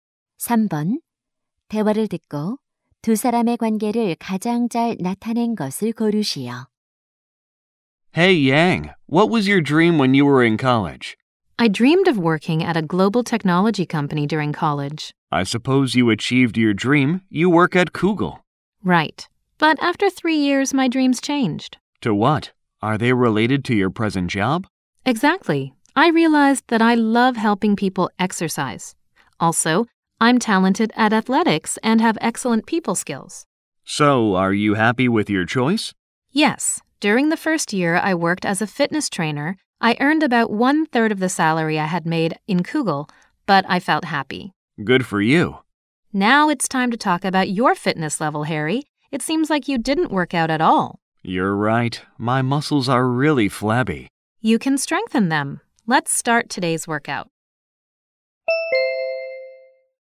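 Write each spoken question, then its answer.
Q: 대화를 듣고 두 사람의 관계를 가장 잘 나타낸 것을 고르시오.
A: 피트니스 트레이너 - 회원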